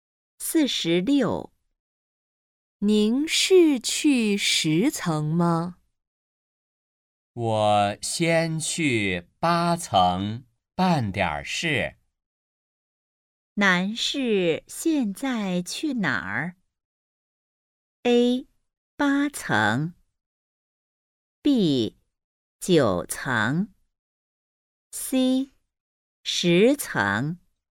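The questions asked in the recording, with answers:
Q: 男士现在去哪儿?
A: A: 八层。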